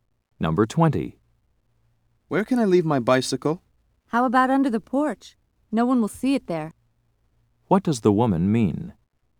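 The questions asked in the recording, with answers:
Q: What does the woman mean?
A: He should leave the bicycle under the porch, where it will be hidden.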